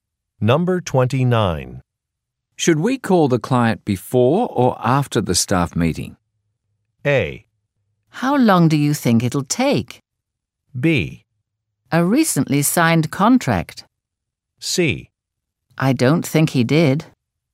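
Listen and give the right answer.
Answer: A: How long do you think it'll take?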